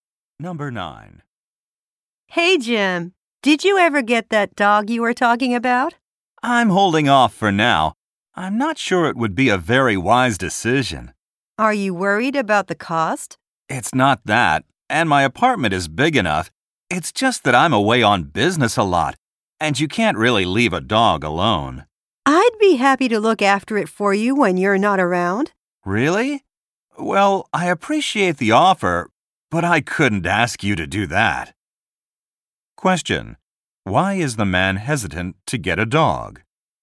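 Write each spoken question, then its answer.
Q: Why is the man hesitant to get a dog?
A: He is away on business a lot and couldn't leave the dog alone.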